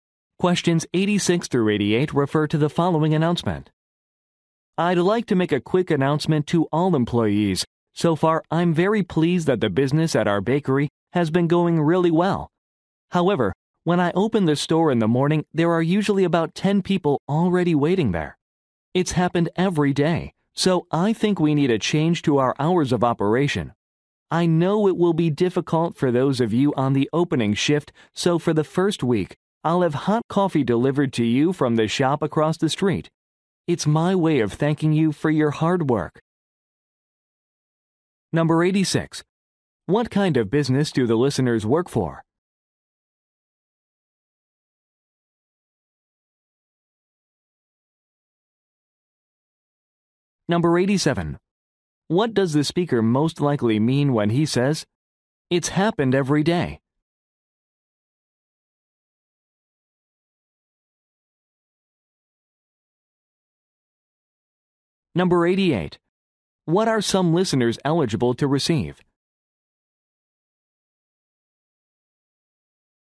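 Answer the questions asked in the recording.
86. A bakery
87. The store should open earlier
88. Free hot coffee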